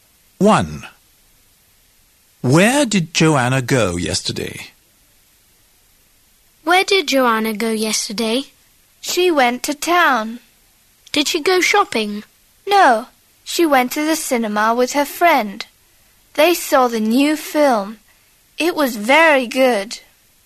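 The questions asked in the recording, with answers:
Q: Where did Joanna go yesterday?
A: to the cinema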